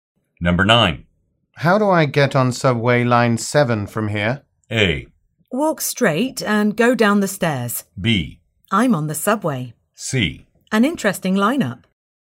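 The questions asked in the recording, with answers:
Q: How do I get on subway line 7 from here?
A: A: Walk straight and go down the stairs.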